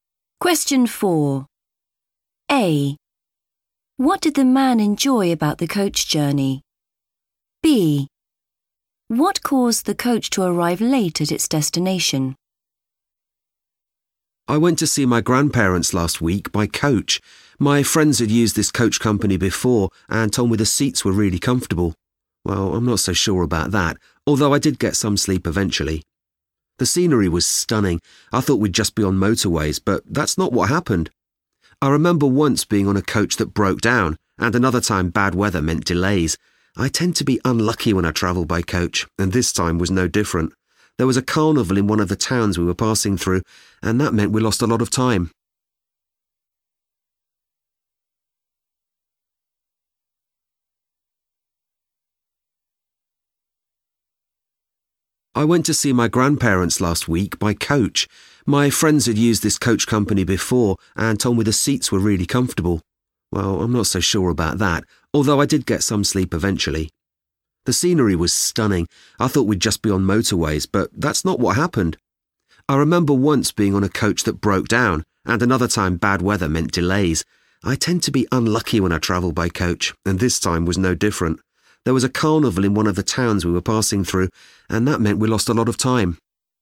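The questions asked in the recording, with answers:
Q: What did the man enjoy about the coach journey?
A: the scenery

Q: What caused the coach to arrive late at its destination?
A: a carnival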